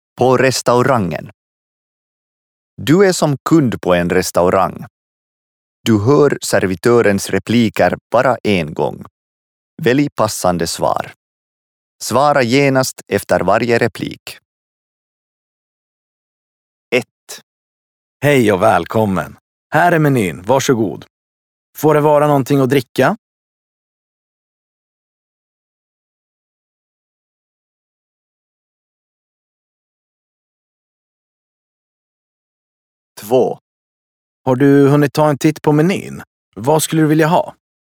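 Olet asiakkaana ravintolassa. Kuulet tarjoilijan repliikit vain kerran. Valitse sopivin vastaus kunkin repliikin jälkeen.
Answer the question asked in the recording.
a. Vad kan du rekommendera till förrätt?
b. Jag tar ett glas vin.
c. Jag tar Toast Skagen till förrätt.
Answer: b. Jag tar ett glas vin.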